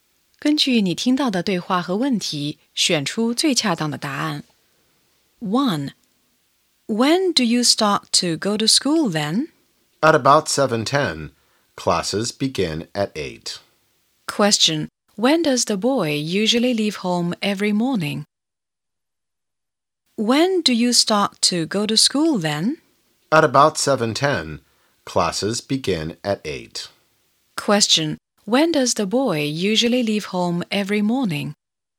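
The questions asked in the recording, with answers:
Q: When does the boy usually leave home every morning?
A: At about 7:10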